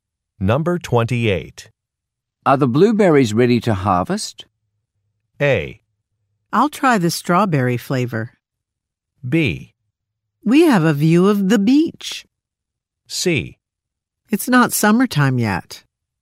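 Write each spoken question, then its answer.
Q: Are the blueberries ready to harvest?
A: C: It's not summertime yet.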